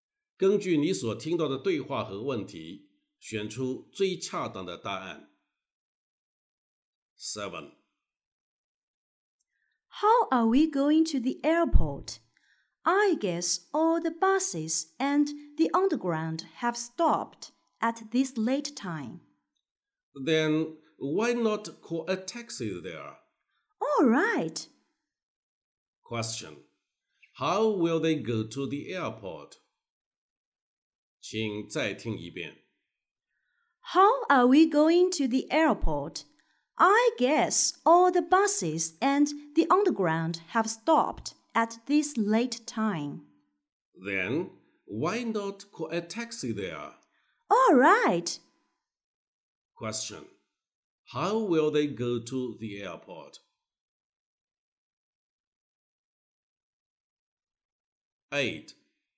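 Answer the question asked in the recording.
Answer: By taxi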